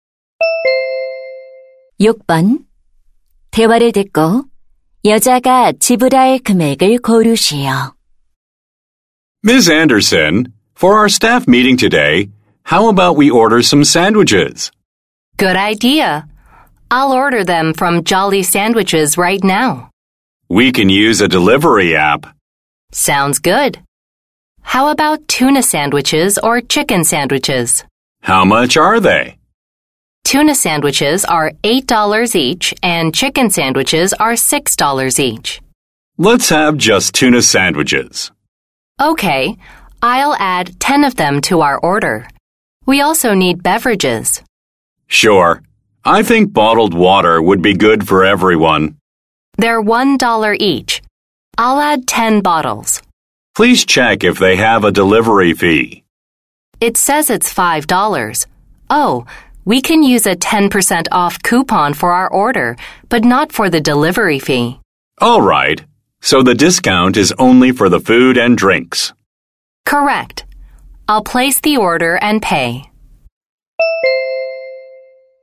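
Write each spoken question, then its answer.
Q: 대화를 듣고 여자가 지불할 금액을 고르시오.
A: $86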